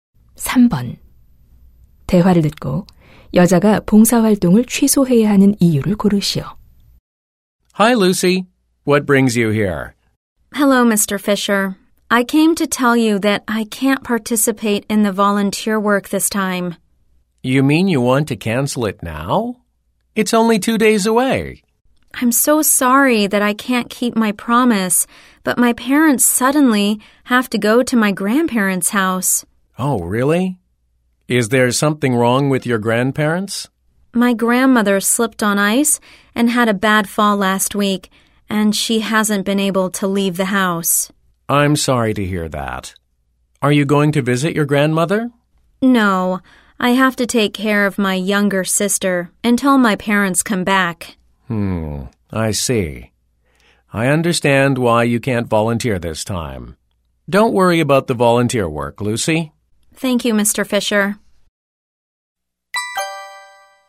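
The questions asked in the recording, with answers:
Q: 대화를 듣고 여자가 봉사활동을 취소해야 하는 이유를 고르시오.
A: 부모님이 조부모님 댁에 가셔서 여동생을 돌봐야 해서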